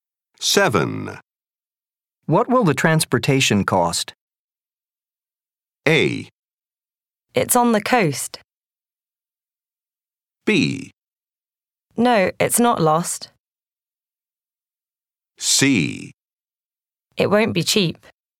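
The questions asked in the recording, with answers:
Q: What will the transportation cost?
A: C: It won't be cheap.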